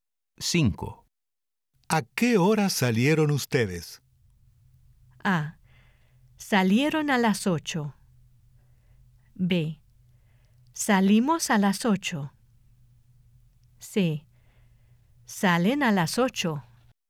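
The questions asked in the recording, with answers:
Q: ¿A qué hora salieron ustedes?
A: B: Salimos a las 8.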